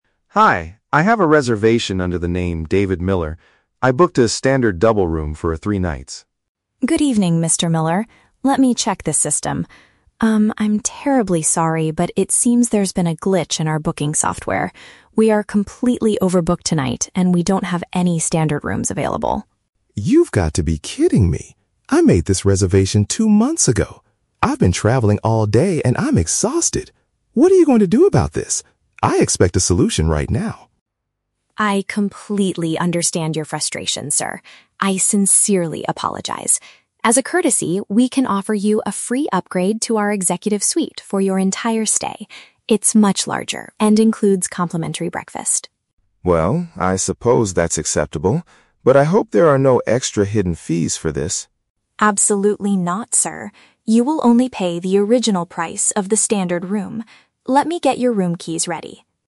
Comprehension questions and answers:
Listen to the conversation between a tourist and a hotel receptionist. Choose the correct answer (A, B, or C) for each question.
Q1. Why is the man upset at the beginning of the conversation?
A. He was charged extra for a double room.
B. His confirmed room is currently unavailable.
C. The hotel's computer lost his personal details.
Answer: B. His confirmed room is currently unavailable.

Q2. How does the man describe his current condition?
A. He is extremely tired from a long journey.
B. He is angry because he waited two months for a refund.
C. He is very hungry and wants to eat breakfast immediately.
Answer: A. He is extremely tired from a long journey.

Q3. How does the receptionist resolve the problem?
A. She transfers him to a different hotel nearby.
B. She asks him to pay a small fee for an executive suite.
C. She gives him a better room at no additional cost.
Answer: C. She gives him a better room at no additional cost.

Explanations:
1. The receptionist tells him that the hotel is "completely overbooked" and they "don't have any standard rooms available." Option (B) uses synonyms to express this exact problem.
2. The man says, "I've been traveling all day and I'm exhausted." "Exhausted" is a strong synonym for "extremely tired."
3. The receptionist offers a "free upgrade to our executive suite" and promises he will "only pay the original price." Option (C) perfectly paraphrases this action.

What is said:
Tourist: Hi, I have a reservation under the name David Miller. I booked a standard double room for three nights.
Receptionist: Good evening, Mr. Miller. Let me check the system. Um, I'm terribly sorry, but it seems there's been a glitch in our booking software. We are completely overbooked tonight, and we don't have any standard rooms available.
Tourist: You've got to be kidding me! I made this reservation two months ago. I've been traveling all day and I'm exhausted. What are you going to do about this? I expect a solution right now.
Receptionist: I completely understand your frustration, sir. I sincerely apologize. As a courtesy, we can offer you a free upgrade to our executive suite for your entire stay. It's much larger and includes complimentary breakfast.
Tourist: Well... I suppose that's acceptable. But I hope there are no extra hidden fees for this?
Receptionist: Absolutely not, sir. You will only pay the original price of the standard room. Let me get your room keys ready.

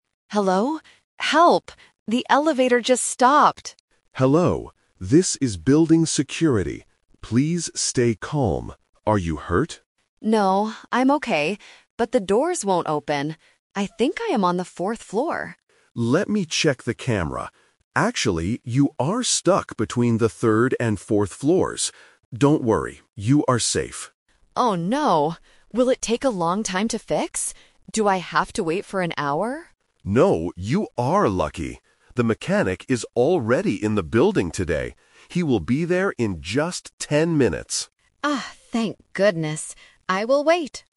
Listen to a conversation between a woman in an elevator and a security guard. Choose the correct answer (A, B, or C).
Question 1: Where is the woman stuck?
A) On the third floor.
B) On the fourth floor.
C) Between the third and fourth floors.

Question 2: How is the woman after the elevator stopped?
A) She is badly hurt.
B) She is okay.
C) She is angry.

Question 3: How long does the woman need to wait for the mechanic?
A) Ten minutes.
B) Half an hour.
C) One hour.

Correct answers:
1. C) Between the third and fourth floors.
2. B) She is okay.
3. A) Ten minutes.

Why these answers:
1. The security guard checks the camera and tells her the exact location: "...you are stuck between the third and fourth floors." Trap (The Twist): Option B (On the fourth floor) is a strong trap. The woman says she thinks she is on the fourth floor, but she is wrong. Option A is not mentioned alone.
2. When the guard asks if she is hurt, the woman answers clearly: "No, I'm okay." Trap: Option A (She is badly hurt) is a distractor because the word "hurt" is used in the guard's question, but she denies it.
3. The security guard tells her the good news: "He will be there in just ten minutes." Trap (The Twist): Option C (One hour) is the trap. The woman is worried and asks "Do I have to wait for an hour?", but the guard says "No".

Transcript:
Woman: Hello? Help! The elevator just stopped!
Security Guard: Hello, this is building security. Please stay calm. Are you hurt?
Woman: No, I'm okay. But the doors won't open. I think I am on the fourth floor.
Security Guard: Let me check the camera. Actually, you are stuck between the third and fourth floors. Don't worry, you are safe.
Woman: Oh no! Will it take a long time to fix? Do I have to wait for an hour?
Security Guard: No, you are lucky. The mechanic is already in the building today. He will be there in just ten minutes.

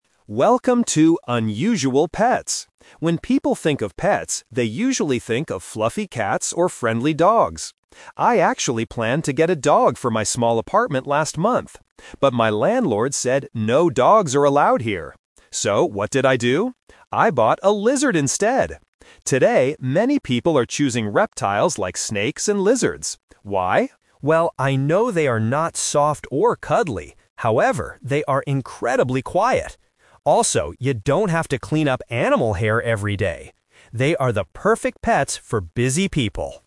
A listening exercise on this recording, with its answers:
Listen to a short podcast about unusual pets and choose the correct answer (A, B, or C).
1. What kind of pet did the podcaster actually get last month?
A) A dog.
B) A cat.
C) A lizard.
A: C) A lizard.

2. Why couldn't the podcaster get a dog?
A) Because dogs make too much noise.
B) Because the apartment landlord did not allow dogs.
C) Because dogs leave too much hair everywhere.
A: B) Because the apartment landlord did not allow dogs.

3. What is one good thing about having a snake or a lizard, according to the podcaster?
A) They are very soft and cuddly.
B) They are incredibly quiet.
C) They are very cheap to buy.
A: B) They are incredibly quiet.

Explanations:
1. The podcaster says, "I bought a lizard instead!" Option (A) is the trap; he planned to get a dog at first, but changed his mind (The Twist). Option (B) is a distractor mentioned at the beginning as a normal pet.
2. The podcaster clearly states, "my landlord said no dogs are allowed here." Option (A) and (C) are plausible reasons in real life (and hair/noise are mentioned later in the audio), but they are not the reason why he couldn't get a dog.
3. The podcaster explains that reptiles are "incredibly quiet." Option (A) is the trap; he explicitly says, "they are not soft or cuddly." Option (C) is not mentioned in the audio at all.

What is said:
Podcaster: Welcome to 'Unusual Pets'! When people think of pets, they usually think of fluffy cats or friendly dogs. I actually planned to get a dog for my small apartment last month. But my landlord said no dogs are allowed here. So, what did I do? I bought a lizard instead! Today, many people are choosing reptiles like snakes and lizards. Why? Well, I know they are not soft or cuddly, however, they are incredibly quiet. Also, you don't have to clean up animal hair every day. They are the perfect pets for busy people.

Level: A2

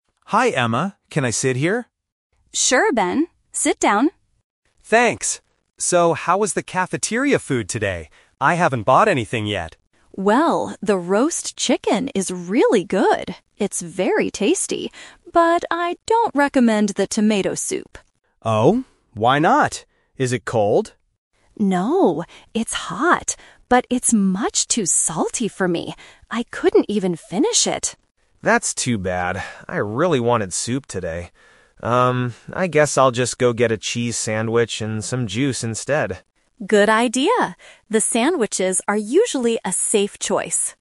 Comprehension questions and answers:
Listen to two students talking in the school cafeteria. Select the best option (A, B, or C) for each question.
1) What does Emma think about the roast chicken?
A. It is cold.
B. It is delicious.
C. It is too salty.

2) Why didn't Emma finish her tomato soup?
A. Because it was cold.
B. Because it had too much salt.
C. Because she was full.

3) What is Ben going to buy for lunch?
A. Tomato soup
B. Roast chicken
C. A sandwich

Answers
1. B. It is delicious.
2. B. Because it had too much salt.
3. C. A sandwich

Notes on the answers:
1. Emma says the roast chicken is "really good" and "very tasty," which means it is delicious. Why the traps are wrong: Option (A) is asked by Ben later about the soup, not the chicken. Option (C) is a trap because "salty" describes the soup, not the chicken.
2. Emma says the soup is "much too salty for me," which matches having "too much salt." Why the traps are wrong: Option (A) is "The Trap". Ben asks, "Is it cold?" but Emma clearly rejects it by saying, "No, it's hot." Option (C) is a plausible reason for not finishing a meal, but it is never mentioned in the audio.
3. After hearing about the soup, Ben says, "I guess I'll just go get a cheese sandwich... instead." Why the traps are wrong: Option (A) is "The Twist Trap". Ben says, "I really wanted soup today," but he changes his mind because Emma says it is bad. Option (B) is what Emma is eating, not what Ben decides to buy.

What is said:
Ben: Hi Emma, can I sit here?
Emma: Sure, Ben. Sit down.
Ben: Thanks. So, how is the cafeteria food today? I haven't bought anything yet.
Emma: Well, the roast chicken is really good. It's very tasty. But I don't recommend the tomato soup.
Ben: Oh? Why not? Is it cold?
Emma: No, it's hot, but it's much too salty for me. I couldn't even finish it.
Ben: That's too bad. I really wanted soup today. I guess I'll just go get a cheese sandwich and some juice instead.

